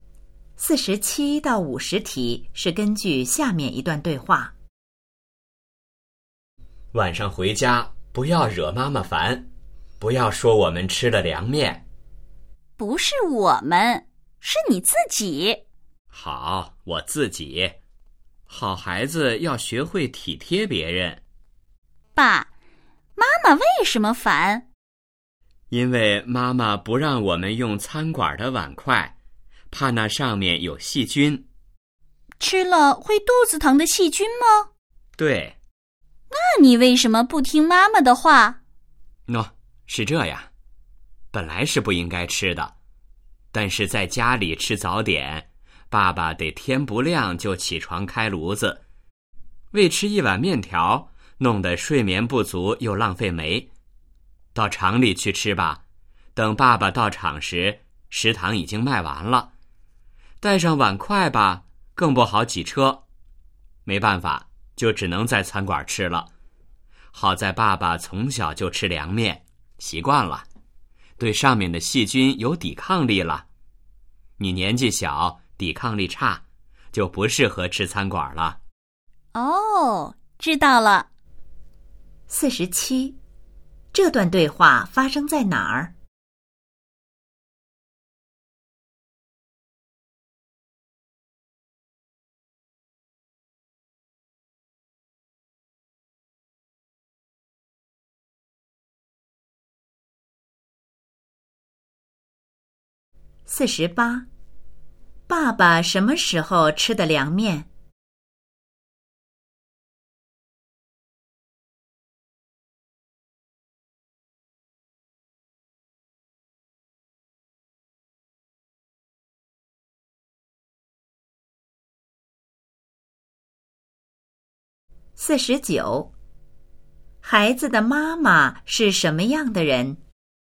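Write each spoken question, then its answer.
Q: 爸爸什么时候吃的凉面?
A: 早上(早点)

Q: 孩子的妈妈是什么样的人?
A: 讲卫生、怕细菌的人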